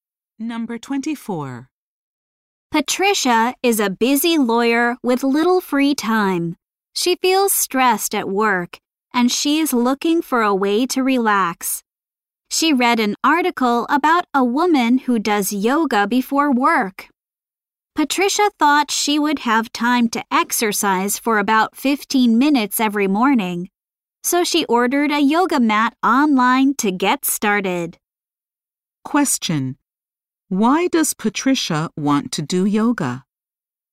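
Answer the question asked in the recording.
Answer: To relax because she feels stressed at work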